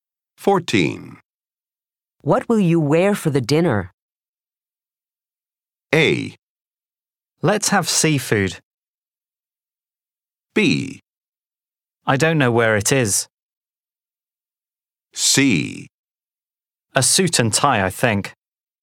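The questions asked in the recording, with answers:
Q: What will you wear for the dinner?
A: C: A suit and tie, I think.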